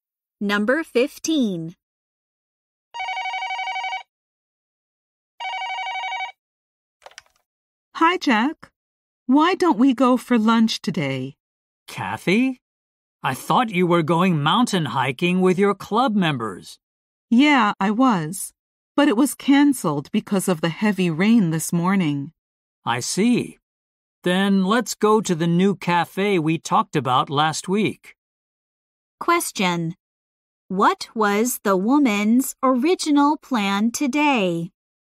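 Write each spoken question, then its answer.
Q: What was the woman's original plan today?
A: To go mountain hiking with her club members.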